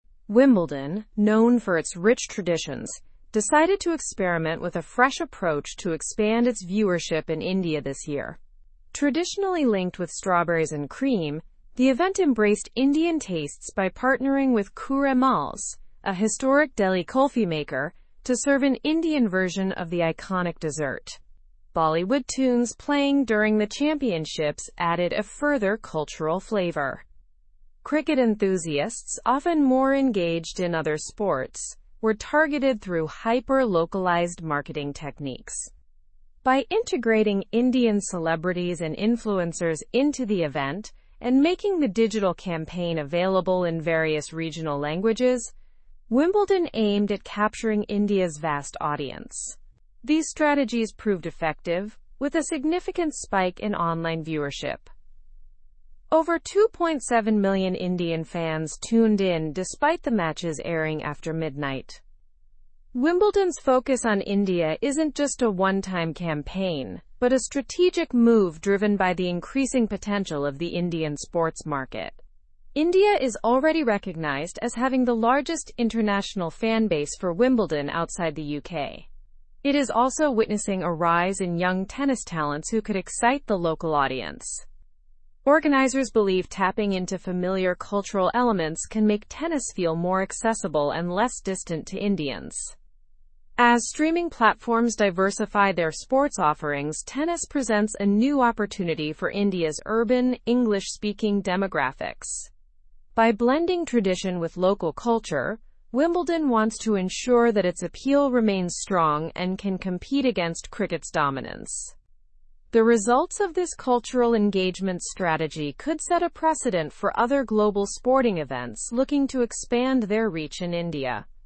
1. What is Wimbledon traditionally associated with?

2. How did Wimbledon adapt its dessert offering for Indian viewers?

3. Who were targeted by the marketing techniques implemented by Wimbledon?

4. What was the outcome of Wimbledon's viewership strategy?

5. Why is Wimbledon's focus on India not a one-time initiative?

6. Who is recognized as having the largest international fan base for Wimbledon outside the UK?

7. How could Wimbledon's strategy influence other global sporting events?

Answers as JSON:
{"1": "Strawberries and cream.", "2": "Partnered with a kulfi maker to serve an Indian version of the dessert.", "3": "Cricket enthusiasts and the larger Indian audience.", "4": "A significant spike in online viewership, with over 2.7 million Indian fans tuning in.", "5": "Because the potential of the Indian sports market is increasing.", "6": "India.", "7": "It could set a precedent for expanding reach into new markets."}

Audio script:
Wimbledon, known for its rich traditions, decided to experiment with a fresh approach to expand its viewership in India this year. Traditionally linked with strawberries and cream, the event embraced Indian tastes by partnering with KUReMAL'S, a historic Delhi kulfi maker, to serve an Indian version of the iconic dessert. Bollywood tunes playing during the championships added a further cultural flavor.
Cricket enthusiasts, often more engaged in other sports, were targeted through hyper-localized marketing techniques. By integrating Indian celebrities and influencers into the event and making the digital campaign available in various regional languages, Wimbledon aimed at capturing India's vast audience. These strategies proved effective, with a significant spike in online viewership. Over 2.7 million Indian fans tuned in despite the matches airing after midnight.
Wimbledon's focus on India isn't just a one-time campaign but a strategic move driven by the increasing potential of the Indian sports market. India is already recognized as having the largest international fan base for Wimbledon outside the UK. It is also witnessing a rise in young tennis talents who could excite the local audience. Organizers believe tapping into familiar cultural elements can make tennis feel more accessible and less distant to Indians.
As streaming platforms diversify their sports offerings, tennis presents a new opportunity for India's urban, English-speaking demographics. By blending tradition with local culture, Wimbledon wants to ensure that its appeal remains strong and can compete against cricket's dominance. The results of this cultural engagement strategy could set a precedent for other global sporting events looking to expand their reach in India.

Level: (Level 3)